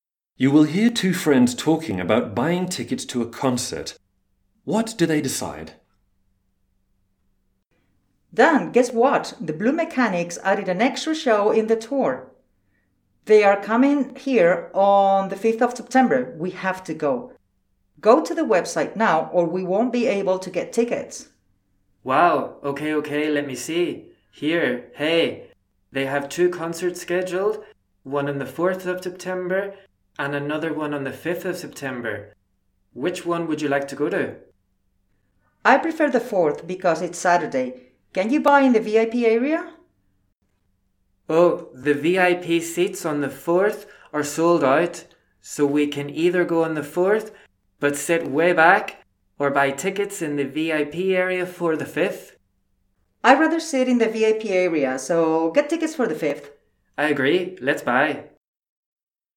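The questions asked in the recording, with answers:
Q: What do they decide?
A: To buy VIP tickets for the concert on the 5th of September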